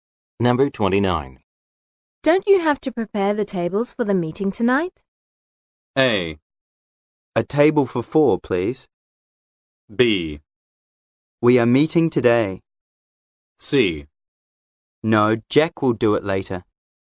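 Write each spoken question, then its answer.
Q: Don't you have to prepare the tables for the meeting tonight?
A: C: No, Jack will do it later.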